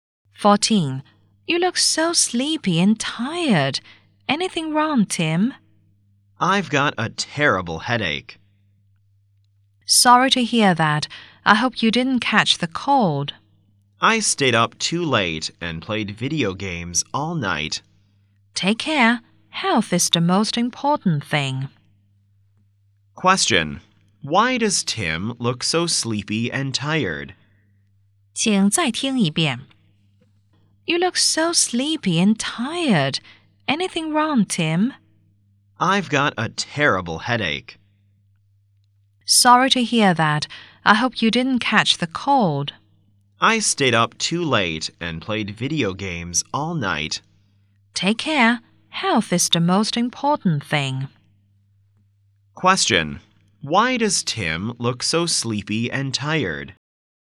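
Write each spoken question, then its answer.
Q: Question. Why does Tim look so sleepy and tired?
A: He stayed up too late playing video games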